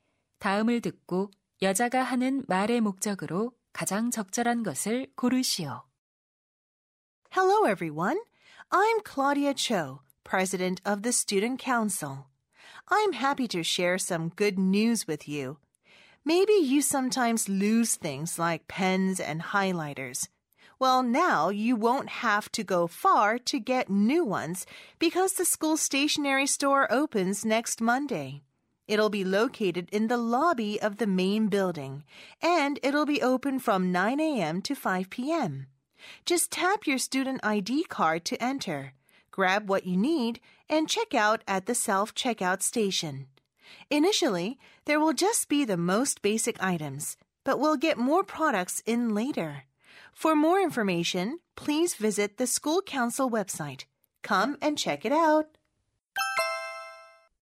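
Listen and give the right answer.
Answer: 학교 문구점 개점을 알리려고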